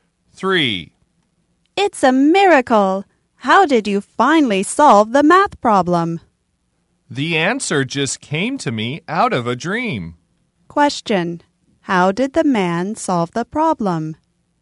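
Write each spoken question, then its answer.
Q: How did the man solve the problem?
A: The answer came to him in a dream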